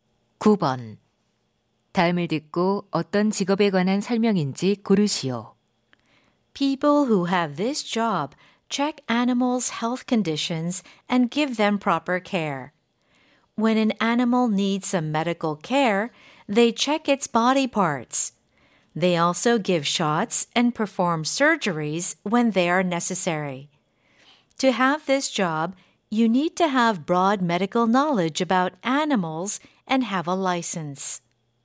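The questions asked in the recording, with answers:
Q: 다음을 듣고 어떤 직업에 관한 설명인지 고르시오.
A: 수의사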